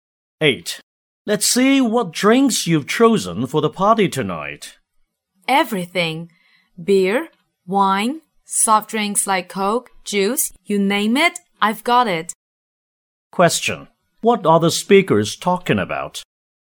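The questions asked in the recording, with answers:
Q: What are the speakers talking about?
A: Drinks for the party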